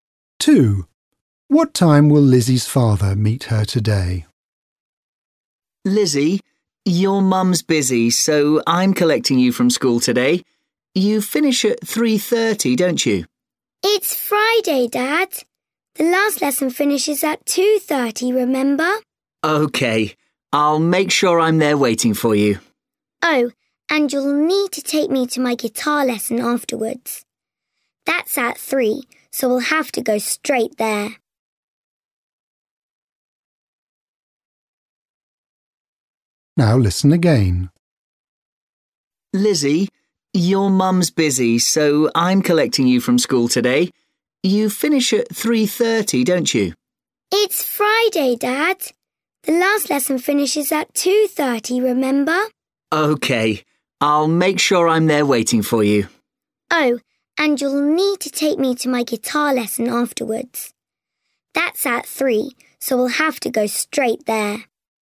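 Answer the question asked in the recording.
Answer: 2:30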